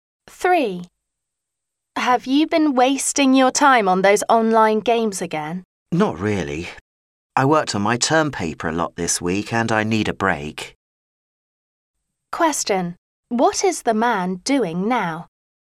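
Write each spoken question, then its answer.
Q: What is the man doing now?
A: Taking a break by playing online games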